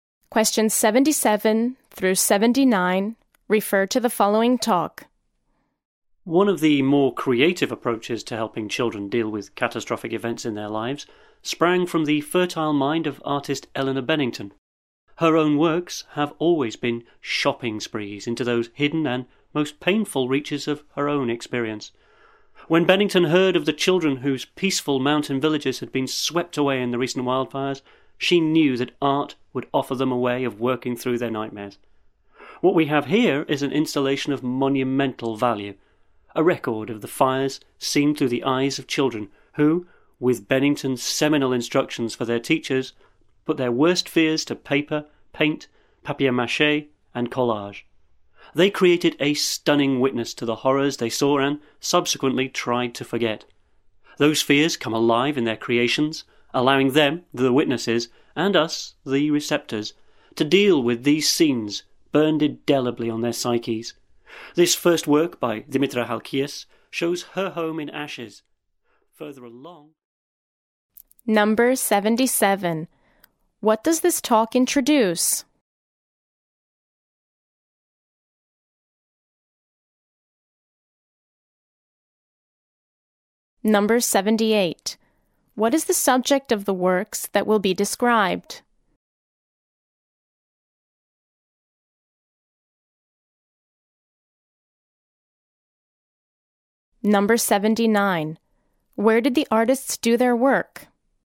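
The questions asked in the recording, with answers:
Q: What does this talk introduce?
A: An art installation of children's works about the wildfires

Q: What is the subject of the works that will be described?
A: The recent wildfires that destroyed their villages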